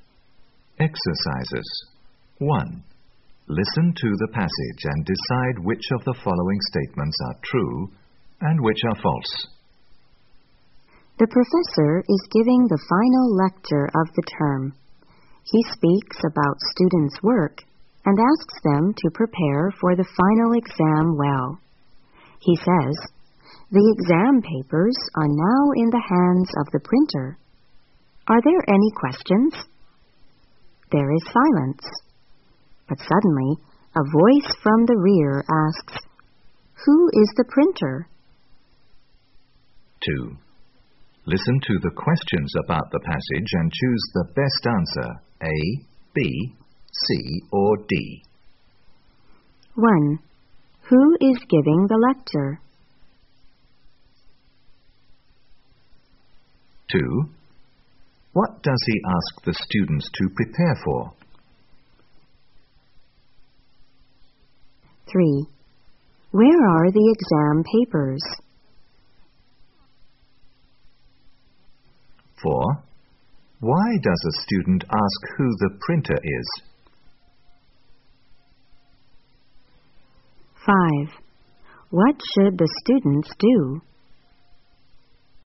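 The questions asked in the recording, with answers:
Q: Who is giving the lecture?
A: The professor

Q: What does he ask the students to prepare for?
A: The final exam

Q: Where are the exam papers?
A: In the hands of the printer

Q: What should the students do?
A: Prepare well for the final exam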